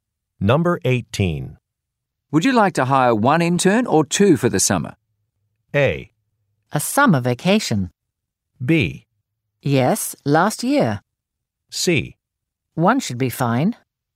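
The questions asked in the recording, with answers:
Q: Would you like to hire one intern or two for the summer?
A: C: One should be fine.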